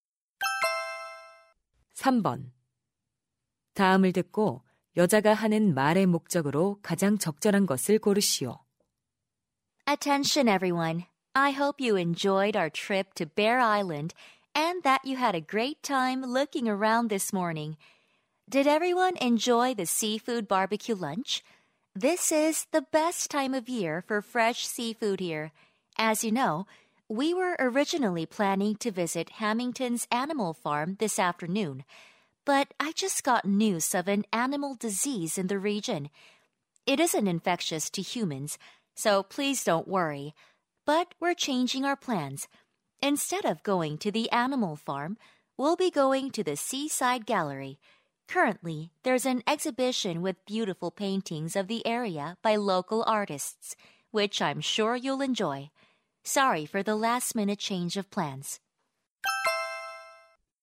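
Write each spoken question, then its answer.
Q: 다음을 듣고 여자가 하는 말의 목적으로 가장 적절한 것을 고르시오.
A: 오후 일정 변경(동물 농장 대신 갤러리 방문)을 알리려고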